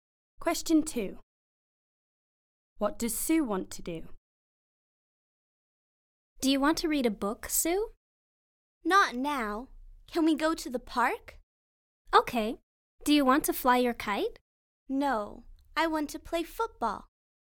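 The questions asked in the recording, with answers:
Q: What does Sue want to do?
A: Play football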